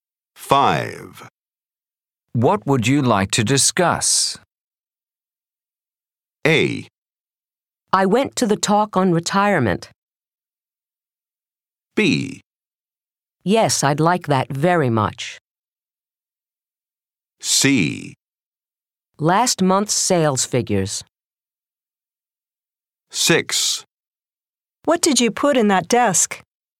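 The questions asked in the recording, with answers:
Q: What would you like to discuss?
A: C: Last month's sales figures.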